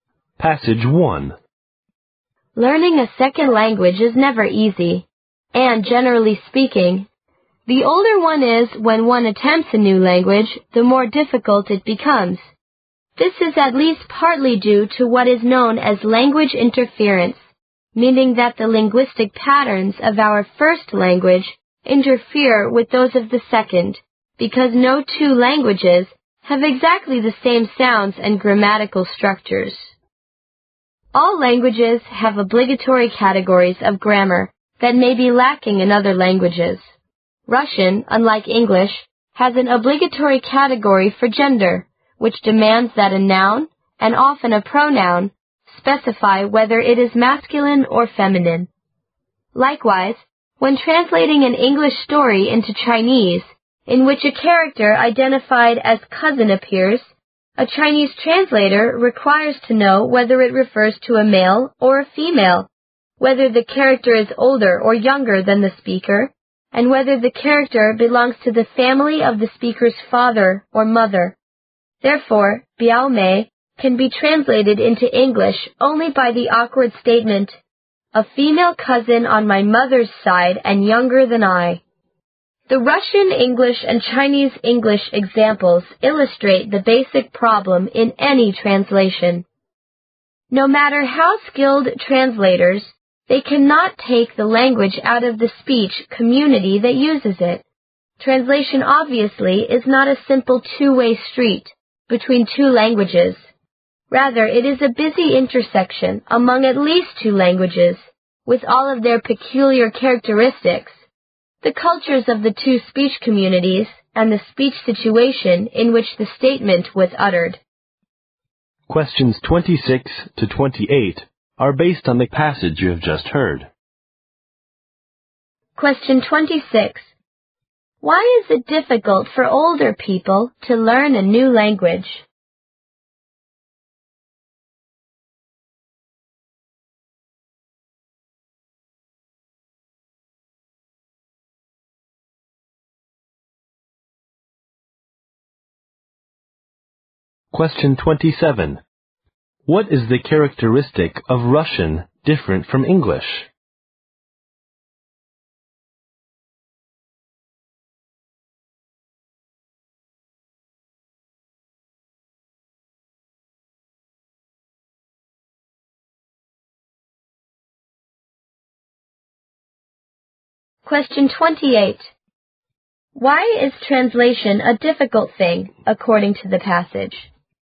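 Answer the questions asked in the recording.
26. Because of interference from their first language
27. It has an obligatory category for gender
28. It involves the languages, the cultures of the speech communities and the speech situation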